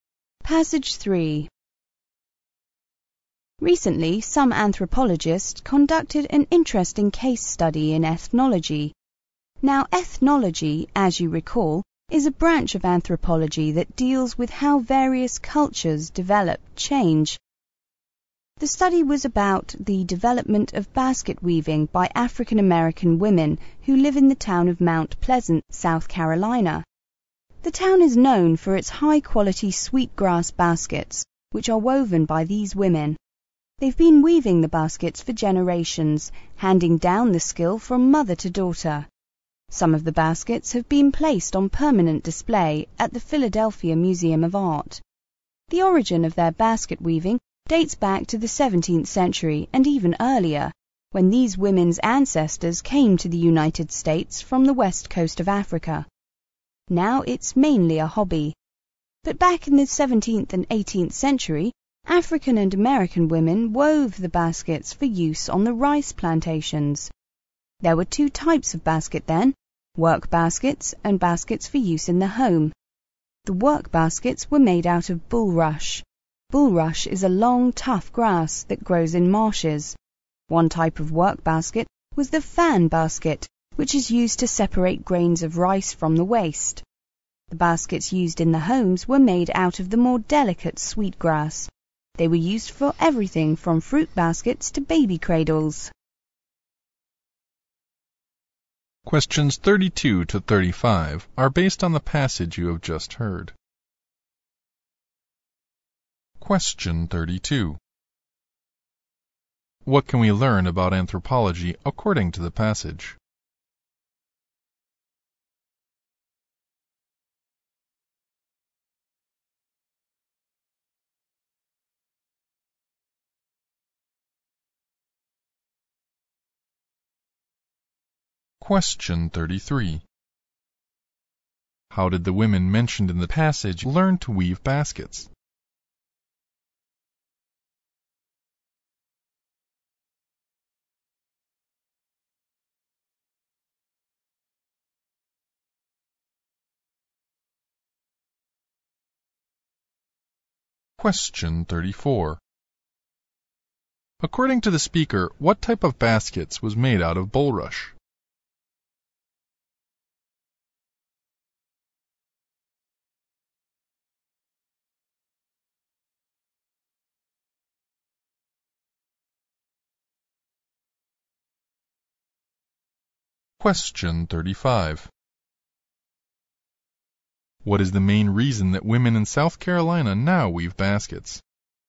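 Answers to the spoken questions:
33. The skill was passed down from mother to daughter.
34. Work baskets
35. As a hobby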